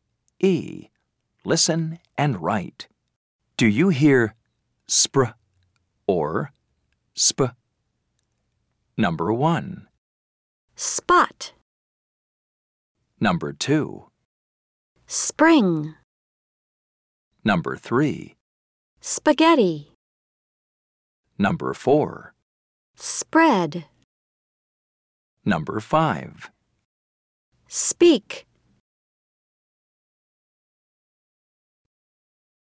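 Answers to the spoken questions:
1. sp
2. spr
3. sp
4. spr
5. sp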